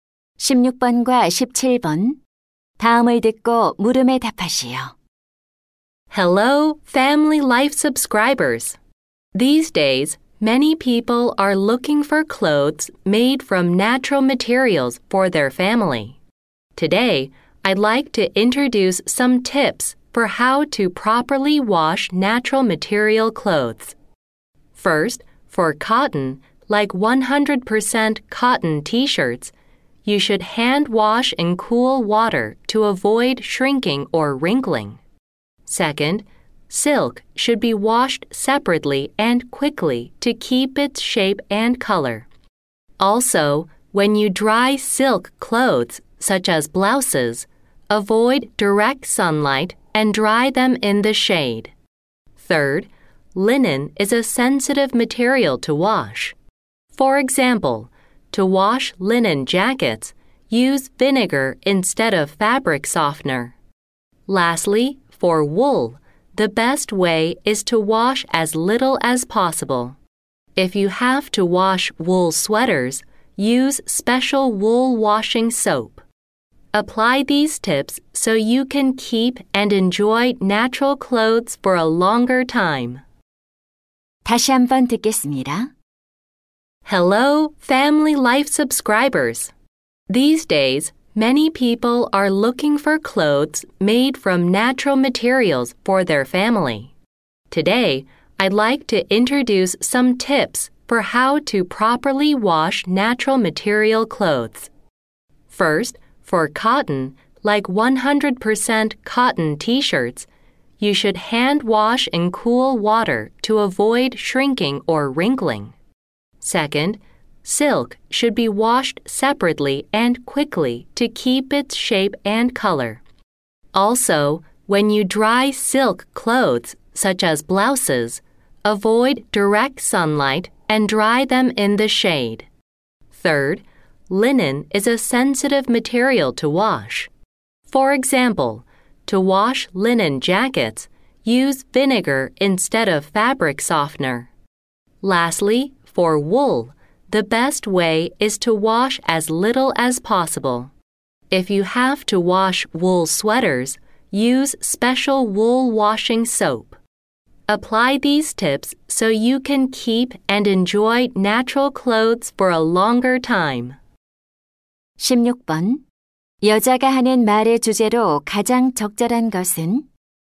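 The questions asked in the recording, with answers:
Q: 여자가 하는 말의 주제로 가장 적절한 것은?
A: 천연 소재 옷을 올바르게 세탁하는 방법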